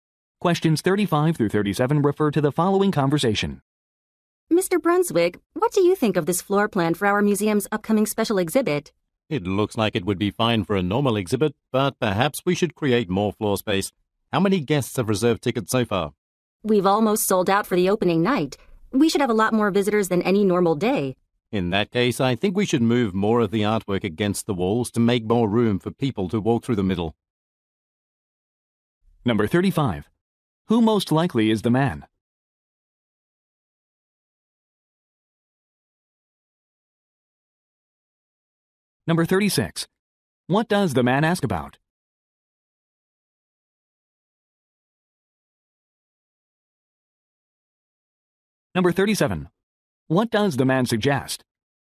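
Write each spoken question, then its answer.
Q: Who most likely is the man?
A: A museum employee

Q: What does the man ask about?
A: How many tickets have been reserved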